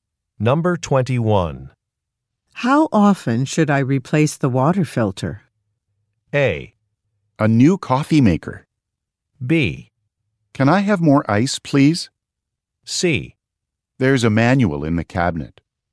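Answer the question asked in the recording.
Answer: C: There's a manual in the cabinet.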